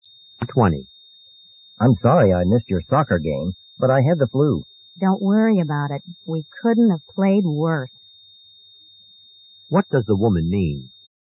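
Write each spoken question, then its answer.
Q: What does the woman mean?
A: The team played very badly, so he didn't miss much.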